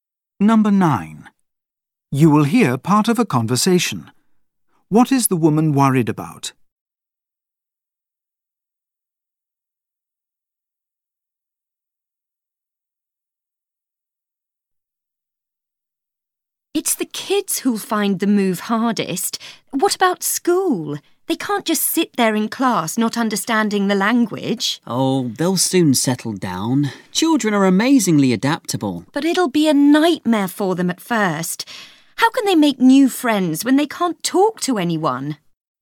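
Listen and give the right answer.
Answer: The children not speaking the language at their new school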